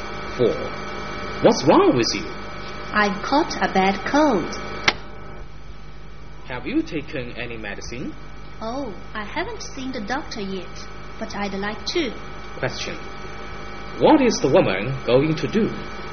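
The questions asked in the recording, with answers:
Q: What is the woman going to do?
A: See the doctor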